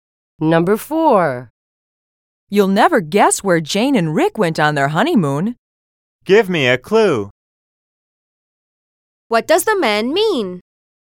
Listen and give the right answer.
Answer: He wants her to give him some information to help him guess where Jane and Rick went on their honeymoon.